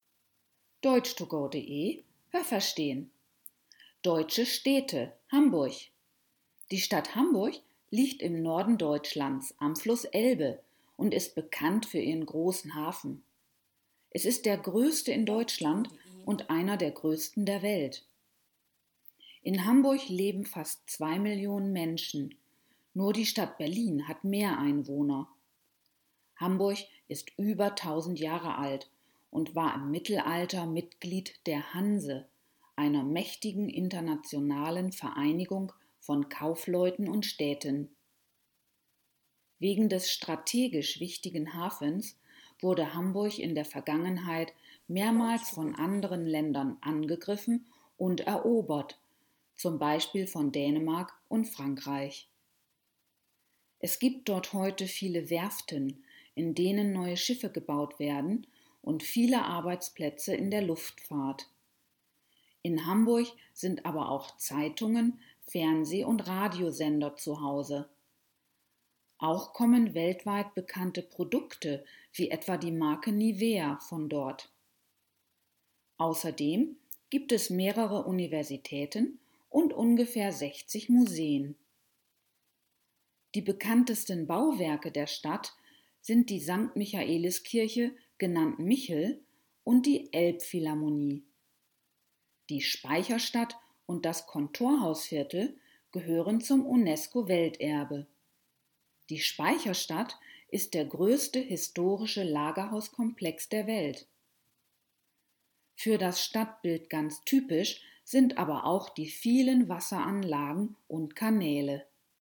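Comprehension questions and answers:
Haben Sie das gehört? Stimmt diese Aussage?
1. Die Stadt Hamburg liegt in der Mitte Deutschlands.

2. Der Hamburger Hafen ist einer der größten der Welt.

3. In Deutschland hat nur Berlin mehr Einwohner als Hamburg.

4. Hamburg war Mitglied der sogenannten Hanse, eines Zusammenschlusses internationaler Kaufleute und Städte.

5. Aus Hamburg kommen weltweit bekannte Produkte wie die der Marke Nike.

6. Es gibt in Hamburg berühmte UNESCO-Welterbestätten.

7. Die Speicherstadt ist eine riesige Werft.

Welche Präposition passt?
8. Hamburg war _____ Mittelalter Mitglied der Hanse.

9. Die Hanse war eine Vereinigung _____ Städten und Kaufleuten.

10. Auch viele Zeitungen, Fernseh- und Radiosender sind in Hamburg _____ Hause.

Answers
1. falsch
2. richtig
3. richtig
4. richtig
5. falsch
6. richtig
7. falsch
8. im
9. von
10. zu

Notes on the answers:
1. Sie liegt im Norden.
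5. Nike kommt aus den USA, aus Hamburg kommt Nivea.
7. Sie ist der größte historische Lagerhauskomplex der Welt.

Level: B (mittel)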